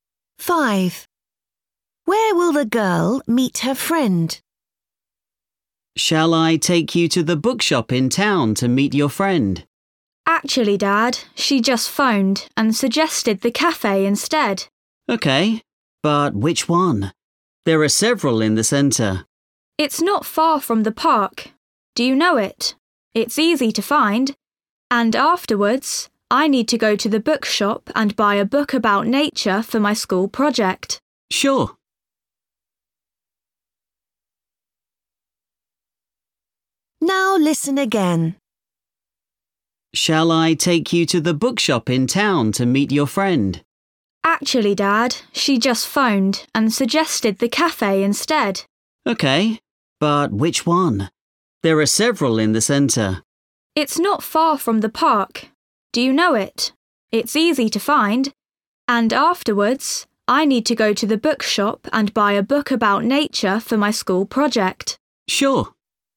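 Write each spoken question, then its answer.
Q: Where will the girl meet her friend?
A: At the cafe near the park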